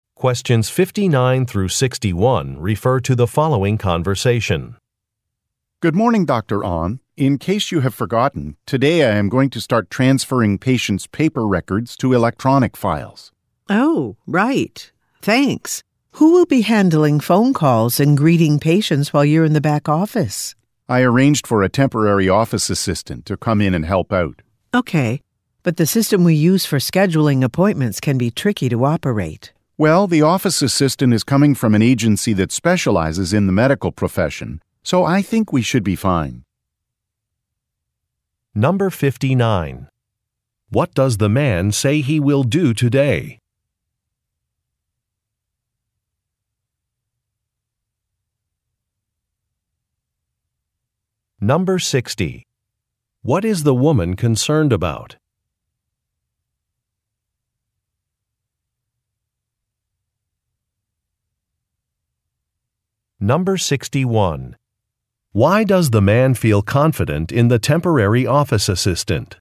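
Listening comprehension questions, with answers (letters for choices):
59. What does the man say he will do today?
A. Greet patients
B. Train a new employee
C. Transfer medical records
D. Make appointments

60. What is the woman concerned about?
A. The cost of hiring a new office assistant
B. Maintaining the security of electronic files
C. The privacy of patients in the office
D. Using a scheduling system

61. Why does the man feel confident in the temporary office assistant?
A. He will be able to help the assistant if the office gets busy.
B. He has worked with the assistant on other projects.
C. The doctor recommended that he hire the assistant.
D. The assistant comes from an agency that specializes in medical work.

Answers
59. C
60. D
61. D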